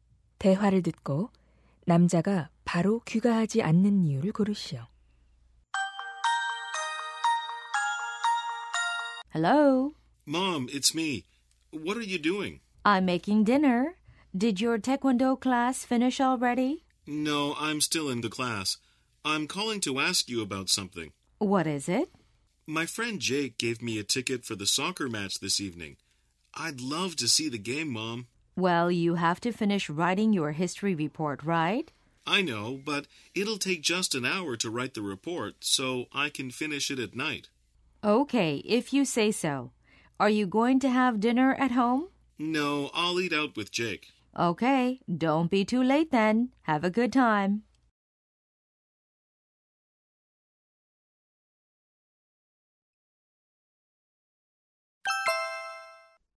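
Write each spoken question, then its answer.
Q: 대화를 듣고 남자가 바로 귀가하지 않는 이유를 고르시오.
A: 친구와 축구 경기를 보러 가기 때문에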